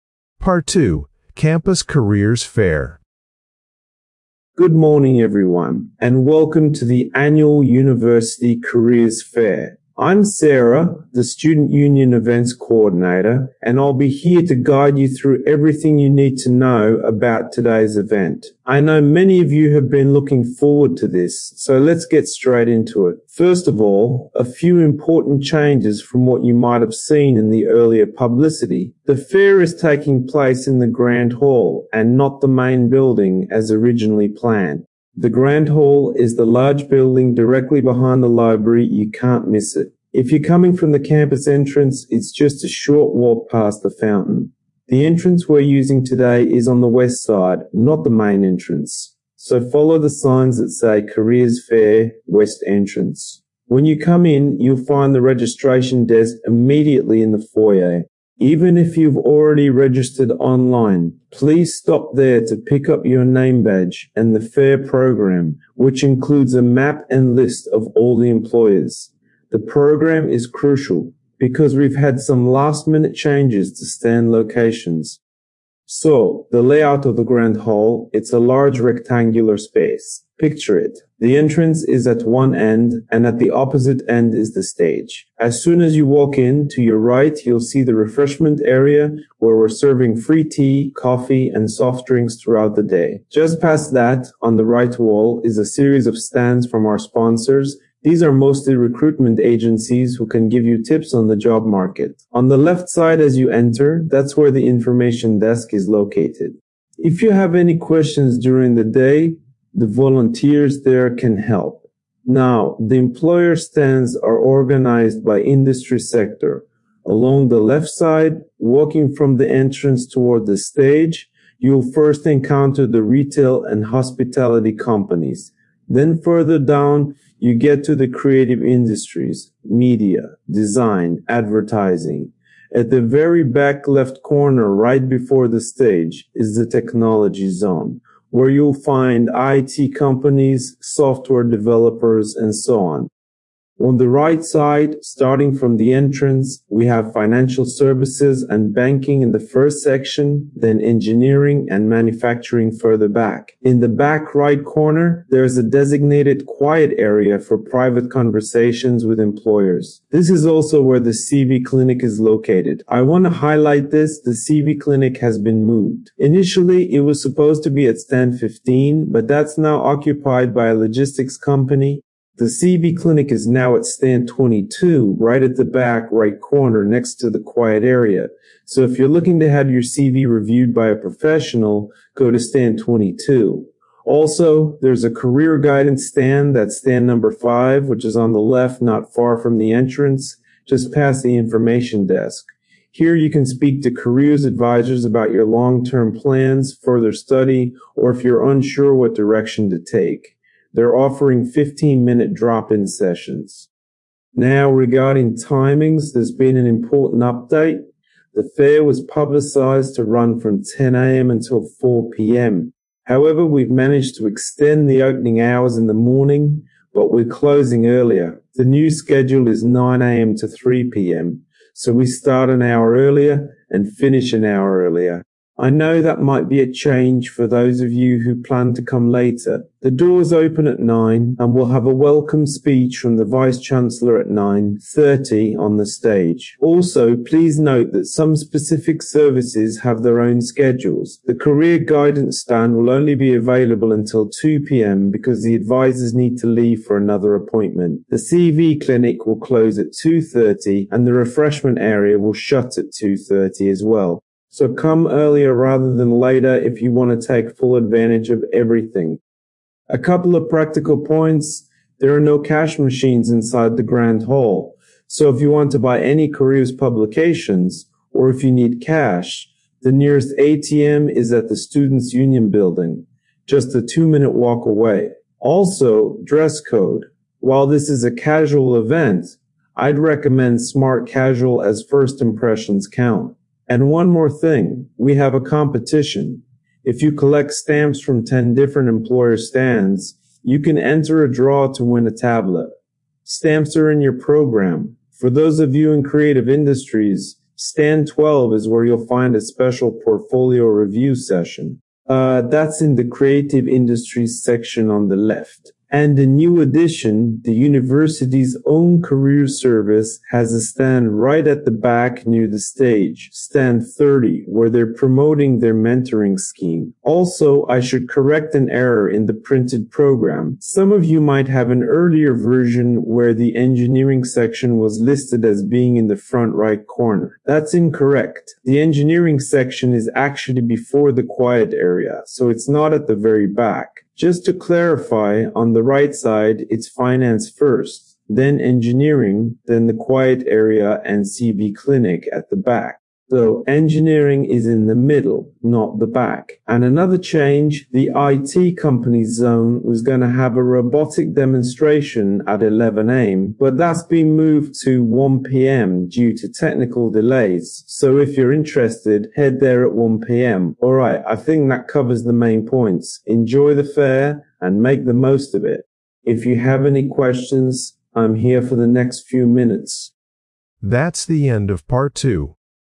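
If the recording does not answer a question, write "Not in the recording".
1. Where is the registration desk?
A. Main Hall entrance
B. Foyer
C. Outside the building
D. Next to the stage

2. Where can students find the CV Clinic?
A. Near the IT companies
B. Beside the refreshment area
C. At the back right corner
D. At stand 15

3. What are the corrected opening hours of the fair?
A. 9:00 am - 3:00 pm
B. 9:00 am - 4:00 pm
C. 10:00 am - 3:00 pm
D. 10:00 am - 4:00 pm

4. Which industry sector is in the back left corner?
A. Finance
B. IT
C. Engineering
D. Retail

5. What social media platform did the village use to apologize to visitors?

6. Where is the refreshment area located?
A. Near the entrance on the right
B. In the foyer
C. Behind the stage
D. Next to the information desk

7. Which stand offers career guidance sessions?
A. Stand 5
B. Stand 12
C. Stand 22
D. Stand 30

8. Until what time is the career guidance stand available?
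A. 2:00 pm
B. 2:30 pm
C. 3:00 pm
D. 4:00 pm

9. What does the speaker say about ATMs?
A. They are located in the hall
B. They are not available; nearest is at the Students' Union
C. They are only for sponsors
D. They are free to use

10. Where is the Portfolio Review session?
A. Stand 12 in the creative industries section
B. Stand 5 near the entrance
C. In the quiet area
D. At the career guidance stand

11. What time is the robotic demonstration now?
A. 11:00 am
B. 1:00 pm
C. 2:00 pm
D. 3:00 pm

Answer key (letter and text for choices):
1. B. Foyer
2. C. At the back right corner
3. A. 9:00 am - 3:00 pm
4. B. IT
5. Not in the recording
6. A. Near the entrance on the right
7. A. Stand 5
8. A. 2:00 pm
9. B. They are not available; nearest is at the Students' Union
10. A. Stand 12 in the creative industries section
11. B. 1:00 pm

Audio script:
Part 2: Campus Careers Fair
Speaker: Good morning, everyone, and welcome to the annual University Careers Fair! 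I'm Sarah, the Student Union events coordinator, and I'll be here to guide you through everything you need to know about today's event. I know many of you have been looking forward to this, so let's get straight into it. First of all, a few important changes from what you might have seen in the earlier publicity. The fair is taking place in the Grand Hall, and not the Main Building as originally planned. The Grand Hall is the large building directly behind the library - you can't miss it. If you're coming from the campus entrance, it's just a short walk past the fountain. The entrance we're using today is on the west side, not the main entrance. So follow the signs that say 'Careers Fair West Entrance'. When you come in, you'll find the registration desk immediately in the foyer. Even if you've already registered online, please stop there to pick up your name badge and the fair programme, which includes a map and list of all the employers. 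The programme is crucial because we've had some last-minute changes to stand locations.
Speaker: So, the layout of the Grand Hall: it's a large rectangular space. Picture it: the entrance is at one end, and at the opposite end is the stage. As soon as you walk in, to your right you'll see the refreshment area, where we're serving free tea, coffee, and soft drinks throughout the day. Just past that, on the right wall, is a series of stands from our sponsors - these are mostly recruitment agencies who can give you tips on the job market. On the left side as you enter, that's where the information desk is located. If you have any questions during the day, the volunteers there can help. Now, the employer stands are organized by industry sector. Along the left side, walking from the entrance toward the stage, you'll first encounter the retail and hospitality companies, then further down you get to the creative industries - media, design, advertising. 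At the very back left corner, right before the stage, is the technology zone, where you'll find IT companies, software developers, and so on.
Speaker: On the right side, starting from the entrance, we have financial services and banking in the first section, then engineering and manufacturing further back. In the back right corner, there's a designated quiet area for private conversations with employers. This is also where the CV Clinic is located. I want to highlight this: the CV Clinic has been moved. Initially, it was supposed to be at stand 15, but that's now occupied by a logistics company. The CV Clinic is now at stand 22, right at the back right corner, next to the quiet area. So if you're looking to have your CV reviewed by a professional, go to stand 22. Also, there's a career guidance stand - that's stand number 5, which is on the left not far from the entrance, just past the information desk. 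Here you can speak to careers advisers about your long-term plans, further study, or if you're unsure what direction to take. They are offering 15-minute drop-in sessions.
Speaker: Now, regarding timings, there's been an important update. The fair was publicized to run from 10 am until 4 pm. However, we've managed to extend the opening hours in the morning, but we're closing earlier. The new schedule is 9 am to 3 pm. So we start an hour earlier and finish an hour earlier. I know that might be a change for those of you who planned to come later. The doors open at nine, and we'll have a welcome speech from the Vice-Chancellor at 9:30 on the stage. Also, please note that some specific services have their own schedules. The career guidance stand will only be available until 2 pm because the advisers need to leave for another appointment. The CV Clinic will close at 2:30, and the refreshment area will shut at 2:30 as well. 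So come earlier rather than later if you want to take full advantage of everything.
Speaker: A couple of practical points: there are no cash machines inside the Grand Hall, so if you want to buy any careers publications or if you need cash, the nearest ATM is at the Students' Union building, just a two-minute walk away. Also, dress code: while this is a casual event, I'd recommend smart casual as first impressions count. And one more thing: we have a competition - if you collect stamps from 10 different employer stands, you can enter a draw to win a tablet. Stamps are in your programme. For those of you in creative industries, stand 12 is where you'll find a special 'Portfolio Review' session. That's in the creative industries section on the left. And a new addition: the university's own careers service has a stand right at the back near the stage, stand 30, where they are promoting their mentoring scheme. 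Also, I should correct an error in the printed programme: some of you might have an earlier version where the engineering section was listed as being in the front right corner. That's incorrect; the engineering section is actually before the quiet area, so it's not at the very back. Just to clarify: on the right side, it's finance first, then engineering, then the quiet area and CV Clinic at the back. So engineering is in the middle, not the back. And another change: the IT companies' zone was going to have a robotic demonstration at 11 am, but that's been moved to 1 pm due to technical delays. So if you're interested, head there at 1 pm. Alright, I think that covers the main points. Enjoy the fair, and make the most of it! If you have any questions, I'm here for the next few minutes.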